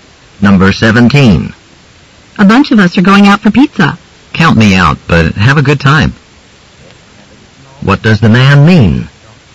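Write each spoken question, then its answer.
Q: What does the man mean?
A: He won't go out for pizza.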